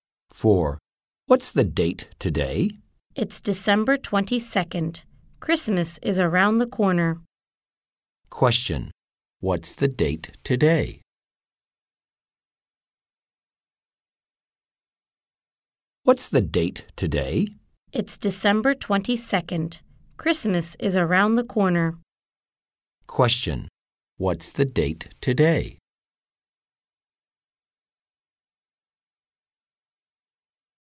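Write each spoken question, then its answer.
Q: what's the date today?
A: December 22nd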